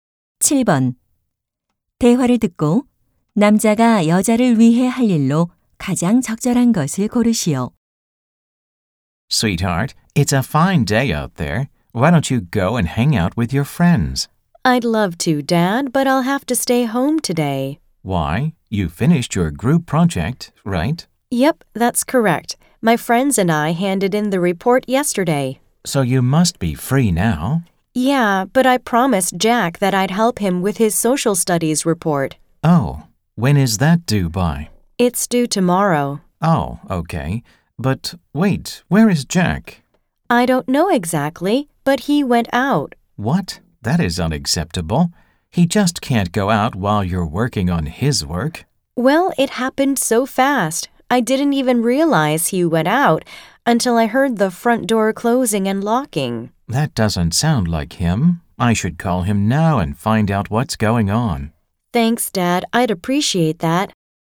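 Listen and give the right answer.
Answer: Jack에게 전화하기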